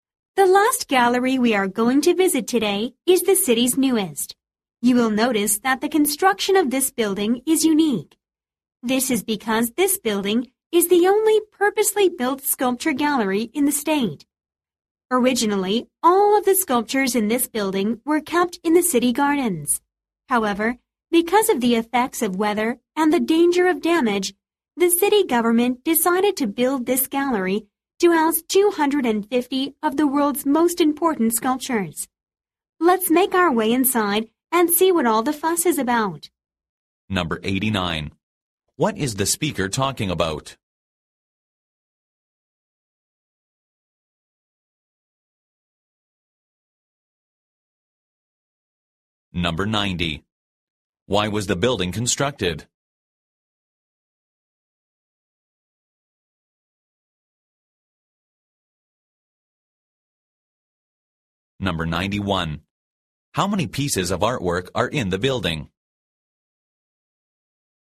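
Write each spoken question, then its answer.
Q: What is the speaker talking about?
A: The city's newest gallery, a purpose-built sculpture gallery

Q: Why was the building constructed?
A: To protect the sculptures from the weather and from damage

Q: How many pieces of artwork are in the building?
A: 250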